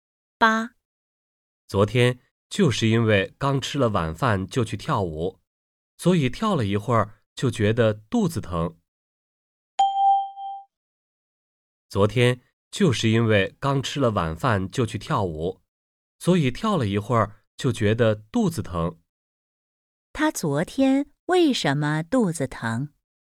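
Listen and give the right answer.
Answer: 刚吃了晚饭就去跳舞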